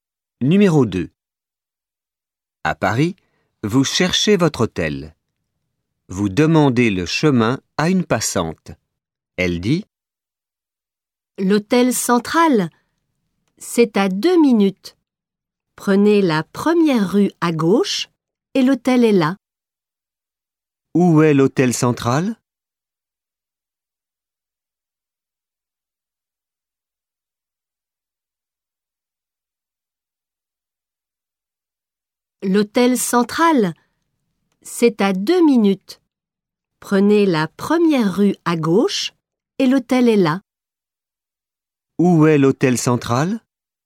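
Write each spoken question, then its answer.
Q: Où est l'hôtel central ?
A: À 2 minutes, première rue à gauche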